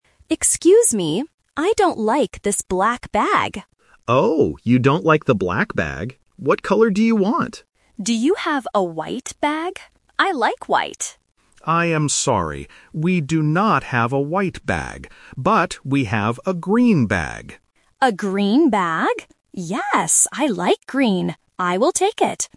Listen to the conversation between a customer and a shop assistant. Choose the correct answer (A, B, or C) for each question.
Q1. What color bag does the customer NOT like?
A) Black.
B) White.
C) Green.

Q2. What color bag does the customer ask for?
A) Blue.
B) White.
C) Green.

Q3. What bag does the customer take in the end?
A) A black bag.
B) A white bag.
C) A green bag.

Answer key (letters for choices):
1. A
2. B
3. C

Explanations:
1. The customer says in the first sentence, "I don't like this black bag." The assistant also repeats this. Options B and C are traps because they are the colors discussed later in the conversation.
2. The customer explicitly asks, "Do you have a white bag? I like white." Option C (Green) is the trap because it is the color the assistant offers. Option A is not mentioned.
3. The assistant offers a green bag. The customer then agrees: "Yes, I like green. I will take it!" Option B (A white bag) is the trap because the customer wanted it, but the shop does not have it ("We do not have a white bag"). Option A is the bag she doesn't like.

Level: A1